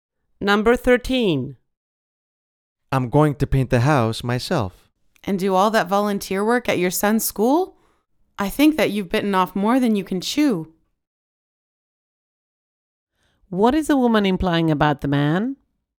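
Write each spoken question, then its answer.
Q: What is the woman implying about the man?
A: He has taken on too much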